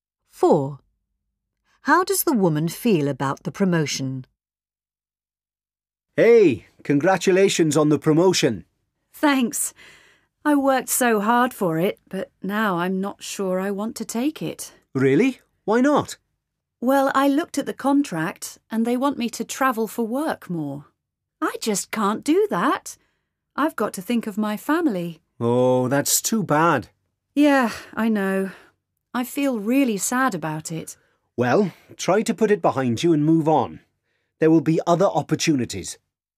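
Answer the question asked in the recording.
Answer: Sad, because she can't travel more for work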